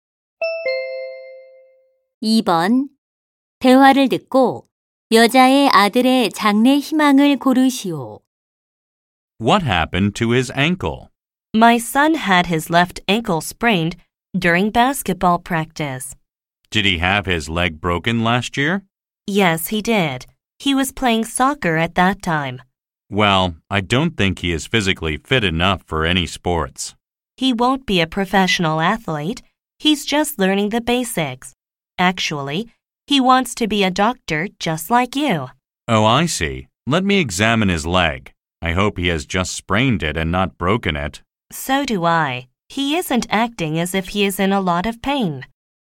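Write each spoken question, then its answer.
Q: 대화를 듣고 여자의 아들의 장래 희망을 고르시오.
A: 의사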